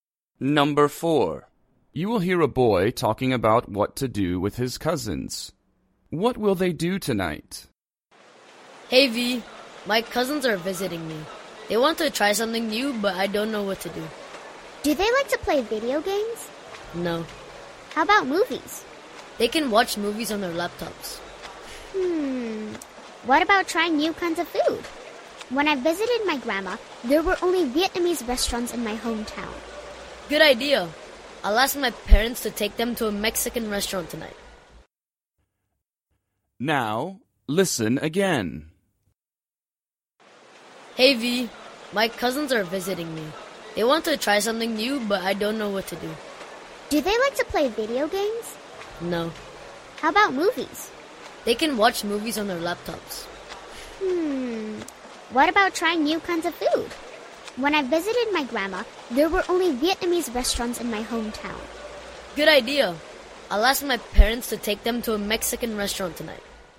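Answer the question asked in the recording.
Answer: Go to a Mexican restaurant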